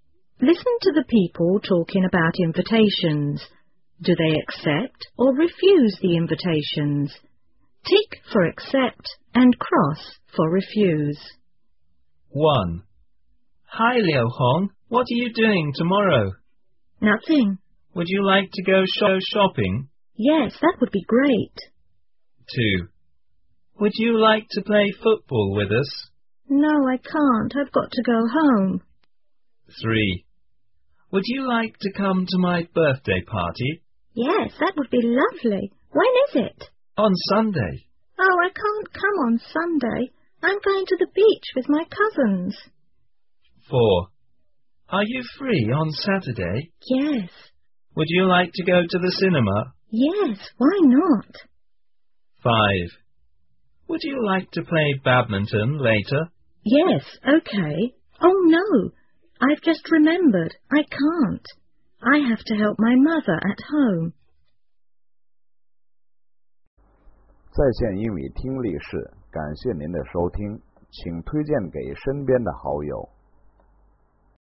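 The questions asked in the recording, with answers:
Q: Do they accept or refuse the invitations?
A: Accept

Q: Do they accept or refuse the invitations?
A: Refuse

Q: Do they accept or refuse the invitations?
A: Refuse

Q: Do they accept or refuse the invitations?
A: Accept

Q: Do they accept or refuse the invitations?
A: Refuse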